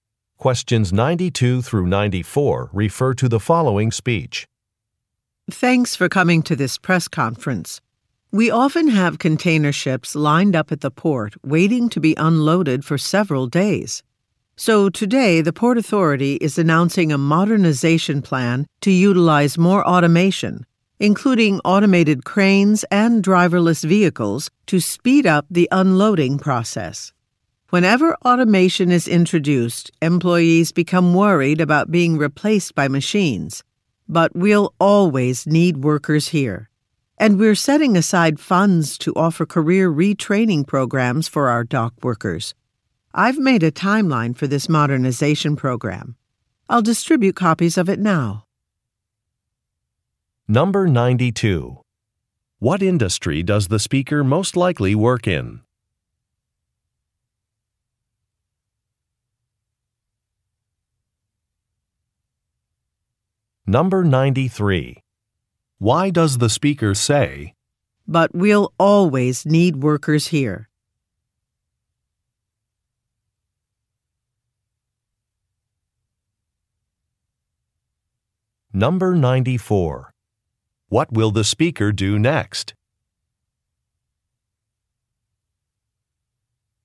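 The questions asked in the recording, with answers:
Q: What industry does the speaker most likely work in?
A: Shipping / port operations

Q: What will the speaker do next?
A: Distribute copies of a timeline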